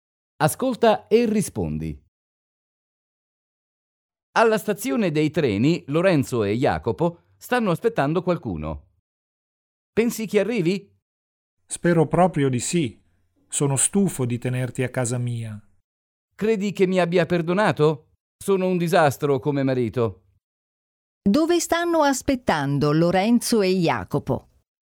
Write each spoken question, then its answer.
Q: Dove stanno aspettando Lorenzo e Jacopo?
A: Lorenzo e Jacopo stanno aspettando alla stazione dei treni.